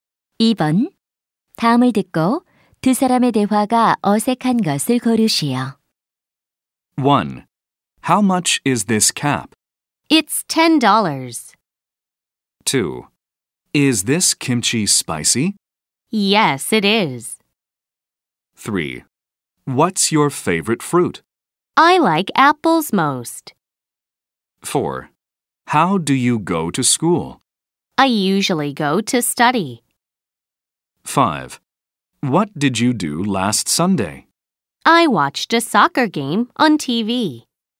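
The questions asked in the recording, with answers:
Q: 다음을 듣고 두 사람의 대화가 어색한 것을 고르시오.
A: 4: How do you go to school? - I usually go to study.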